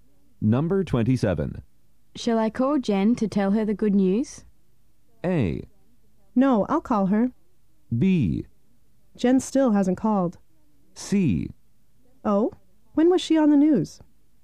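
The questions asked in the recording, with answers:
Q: Shall I call Jen to tell her the good news?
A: A: No, I'll call her.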